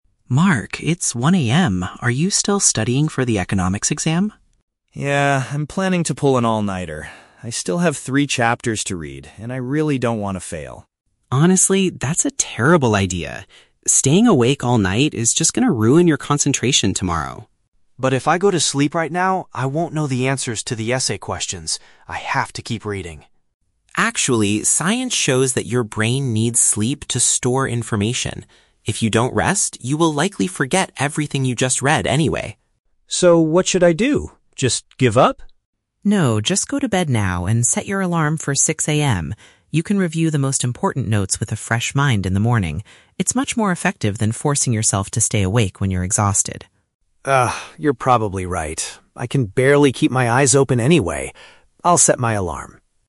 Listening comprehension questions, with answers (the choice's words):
Listen to the conversation between two roommates and choose the correct answer (A, B, or C) for each question.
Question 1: What is Mark's original plan for the night?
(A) To stay awake until morning to prepare for a test.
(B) To wake up very early at 6:00 AM to read three chapters.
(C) To drink lots of coffee so he can finish his essay.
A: To stay awake until morning to prepare for a test.

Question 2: According to Leo, what is the negative effect of skipping sleep?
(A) The student will get a severe headache the next day.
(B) The student will automatically fail the economics class.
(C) The brain cannot successfully keep the new information.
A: The brain cannot successfully keep the new information.

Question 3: What alternative solution does Leo suggest to his roommate?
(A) To review the study materials after getting some rest.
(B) To simply give up and accept whatever grade he gets.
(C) To ask the professor for some extra time to study.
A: To review the study materials after getting some rest.

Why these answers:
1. Mark says he is "planning to pull an all-nighter" for his exam. Option A perfectly paraphrases "pull an all-nighter" as "stay awake until morning." Option B is a trap; waking up at 6:00 AM is Leo's suggestion later in the conversation, not Mark's original plan. Option C is plausible for someone staying up late, but coffee is never mentioned.
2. Leo explains that "your brain needs sleep to store information" and if you don't rest, you will "forget everything you just read." Option C paraphrases this accurately (cannot successfully keep the information). Option A is not mentioned. Option B is a trap; Mark mentions he doesn't want to fail, but Leo does not state that lack of sleep guarantees a failing grade, only that it ruins memory and concentration.
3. Leo tells Mark to go to bed and "review the most important notes with a fresh mind in the morning." Option A perfectly paraphrases this idea. Option B is a trap; Mark asks, "Just give up?" but Leo immediately rejects this idea by saying "No." Option C is a logical solution in real life but is never mentioned in the audio.

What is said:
Leo: Mark, it's 1:00 AM. Are you still studying for the economics exam?
Mark: Yeah, I'm planning to pull an all-nighter. I still have three chapters to read, and I really don't want to fail.
Leo: Honestly, that's a terrible idea. Staying awake all night is just going to ruin your concentration tomorrow.
Mark: But if I go to sleep right now, I won't know the answers to the essay questions. I have to keep reading.
Leo: Actually, science shows that your brain needs sleep to store information. If you don't rest, you will likely forget everything you just read anyway.
Mark: So what should I do? Just give up?
Leo: No, just go to bed now and set your alarm for 6:00 AM. You can review the most important notes with a fresh mind in the morning. It's much more effective than forcing yourself to stay awake when you're exhausted.
Mark: Ugh, you're probably right. I can barely keep my eyes open anyway. I'll set my alarm.